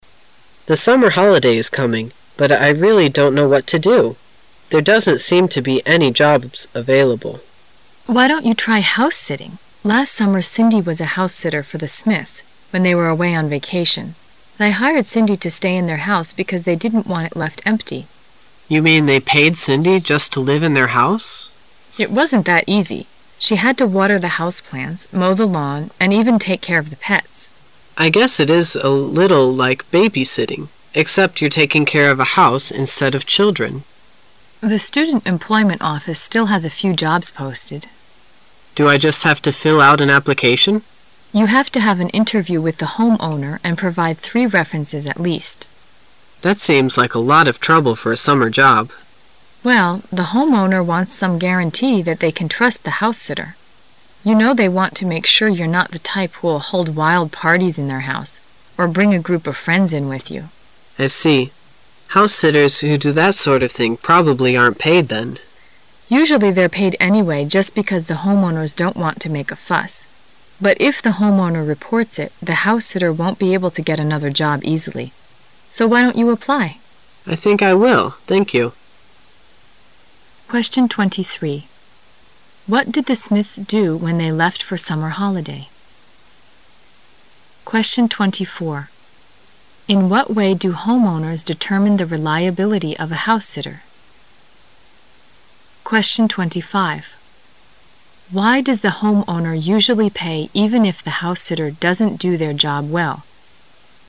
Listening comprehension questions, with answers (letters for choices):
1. In what way do homeowners determine the reliability of a house sitter?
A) They look at a house sitter's score report.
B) They interview a house sitter's friends.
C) They check a house sitter's references.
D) They attend a house sitter's party.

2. Why does the homeowner usually pay even if the house sitter doesn't do their job well?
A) The homeowner is afraid of being accused.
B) The house sitter pleads again and again.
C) Most house sitters are very poor.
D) The homeowner doesn't want to bother.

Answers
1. C
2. D

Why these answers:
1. 由选项可知,本题问的可能是房主对 house sitter考查的方法。根据女士所说,应聘者需要"provide three references at least",所以房主应该是对the house sitter的相关证件进行核查,答案为 [C]。
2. 根据选项,本题可能考查的是房主对待house sitter的工作的态度。从对话中"the homeowners don't want to make a fuss"可知,尽管house setter没有做好自己的工作,但为了息事宁人房主还是会给对方付钱,选[D]make a fuss的意思为"大惊小怪,吵吵闹闹"。

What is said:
[解析] 23-25 M: The summer holiday is coming, but I really don't know what to do. There doesn't seem to be any jobs available. W: Why don't you try house-sitting? Last summer Cindy was a house sitter for the Smiths when they went away on vacation. They hired Cindy to stay in their house because they didn't want it left empty. M: You mean they paid Cindy just to live in their house? W: It wasn't that easy. She had to water the house plants, mow the lawn, and even take care of the pets. M: I guess it is a little like baby-sittingexcept you're taking care of a house instead of children. W: The student employment office still has a few jobs posted. M: Do I just have to fill out an application? W: You have to have an interview with the homeowner and provide three references at least. M: That seems like a lot of trouble for a summer job. W: Well, the homeowner wants some guarantee that they can trust the house sitter. You know they want to make sure you're not the type who'll hold wild parties in their house, or bring a group of friends in with you. M: I see. House sitters who do that sort of thing probably aren't paid then. W: Usually they're paid anyway just because the home owners don't want to make a fuss. But if the home-owner reports it, the house sitter won't be able to get another job easily. So why don't you apply? M: I think I will. Thank you. What did the Smiths do when they left for summer holiday?